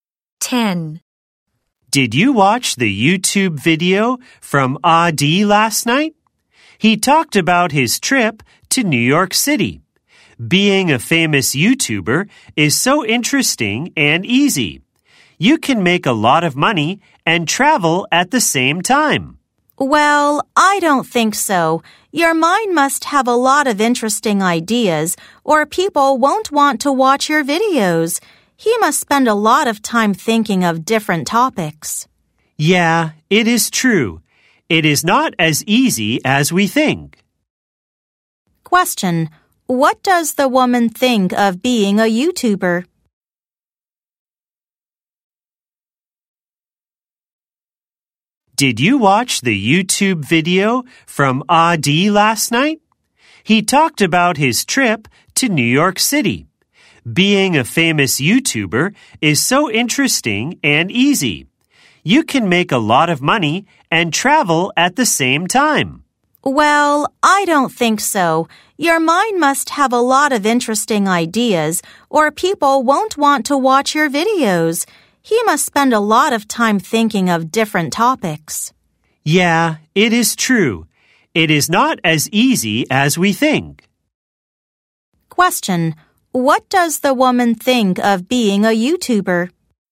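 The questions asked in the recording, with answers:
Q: What does the woman think of being a YouTuber?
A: It is not easy; you need many interesting ideas.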